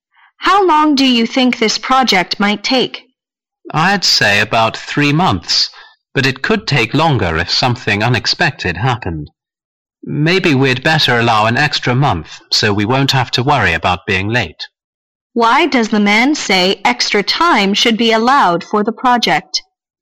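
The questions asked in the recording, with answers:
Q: Why does the man say extra time should be allowed for the project?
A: So they won't have to worry about being late if something unexpected happens.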